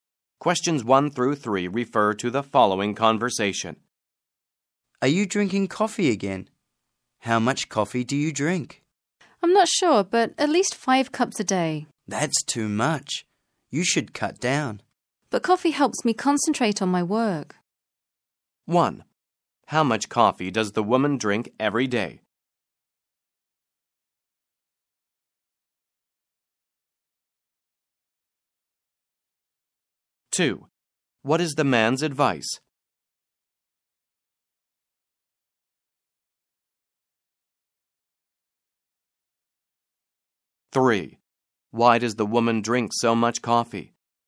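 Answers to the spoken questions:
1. At least 5 cups
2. She should cut down
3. It helps her concentrate on her work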